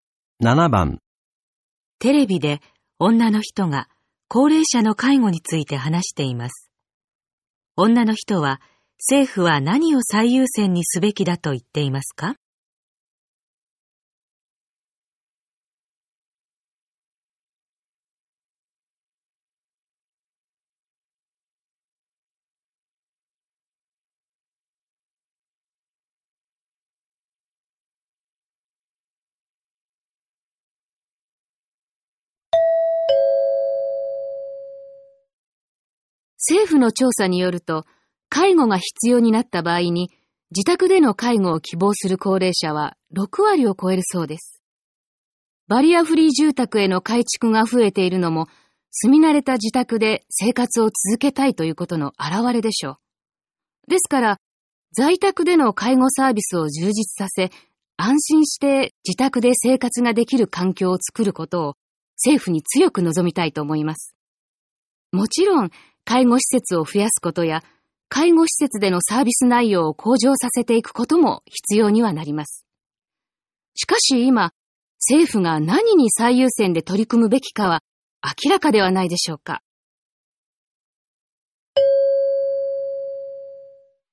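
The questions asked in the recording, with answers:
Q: 女の人は、政府は何を最優先にすべきだと言っていますか?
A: 在宅での介護サービスの充実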